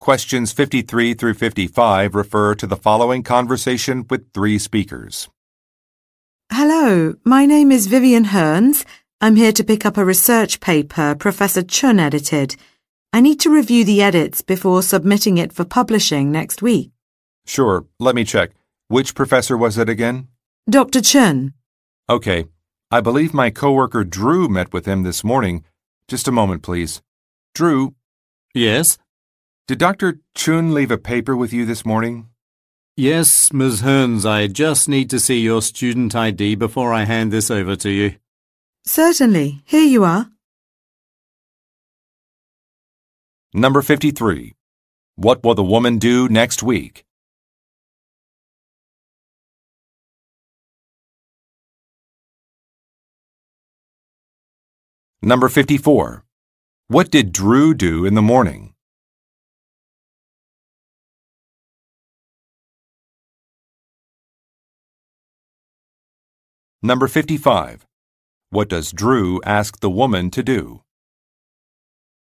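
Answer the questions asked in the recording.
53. Submit a research paper for publishing
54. Met with Dr. Chun
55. Show her student ID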